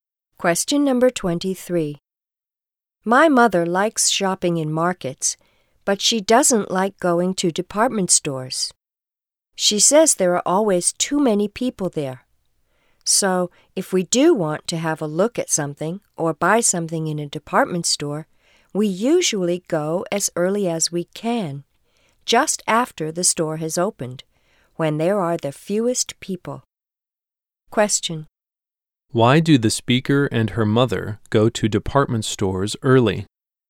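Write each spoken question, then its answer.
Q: Why do the speaker and her mother go to department stores early?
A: There are the fewest people then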